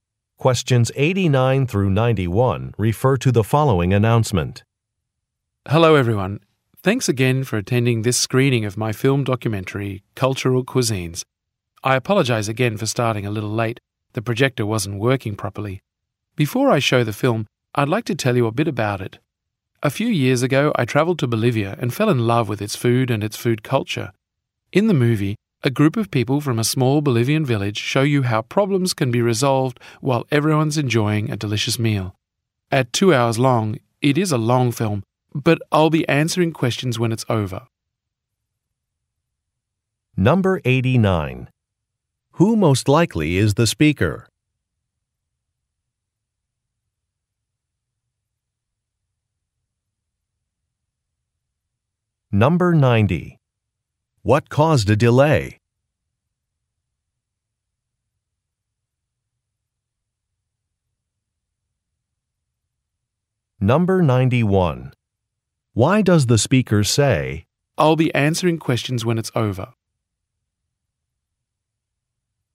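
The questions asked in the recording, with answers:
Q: Who most likely is the speaker?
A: A filmmaker (documentary director)

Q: What caused a delay?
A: The projector was not working properly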